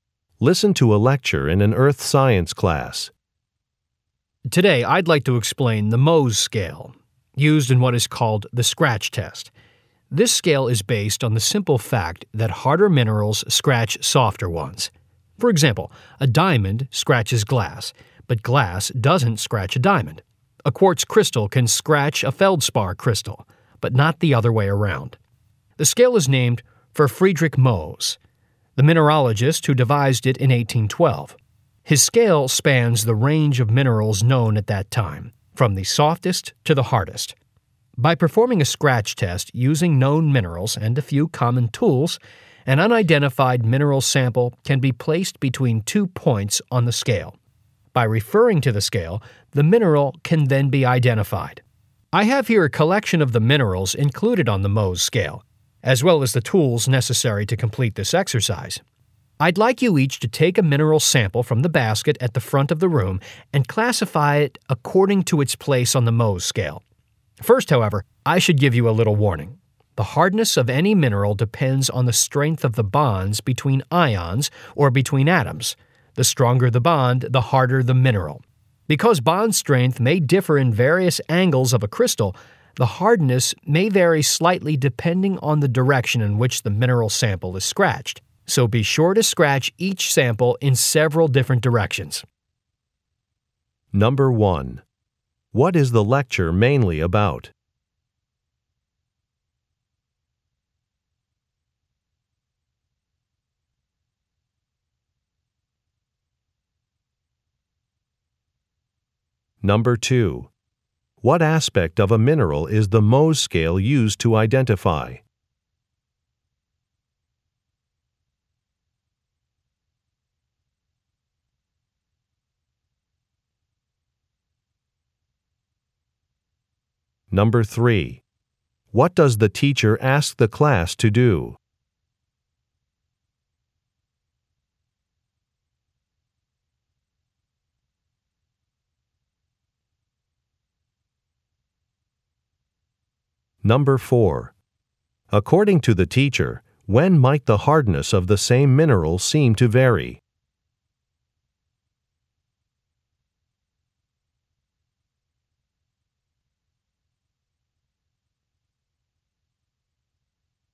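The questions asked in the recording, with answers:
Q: What is the lecture mainly about?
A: The Mohs scale and the scratch test.

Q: What aspect of a mineral is the Mohs scale used to identify?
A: Its hardness.

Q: What does the teacher ask the class to do?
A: Take a mineral sample and classify it on the Mohs scale.

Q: According to the teacher, when might the hardness of the same mineral seem to vary?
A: When it is scratched in different directions.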